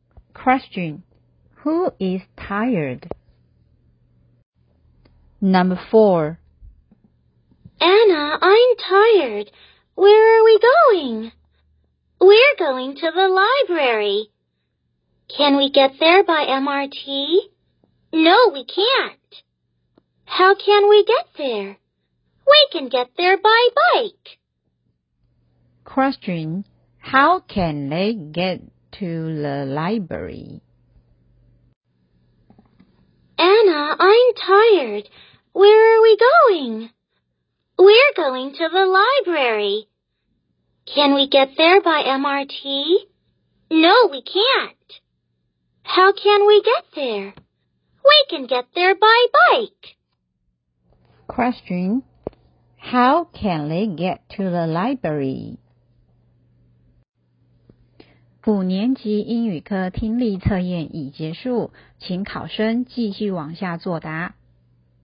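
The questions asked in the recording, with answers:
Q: Question, how can they get to the library?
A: By bike.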